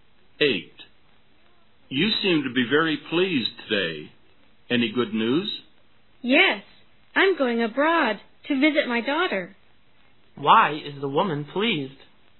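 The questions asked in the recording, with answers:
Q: Why is the woman pleased?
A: She is going abroad to visit her daughter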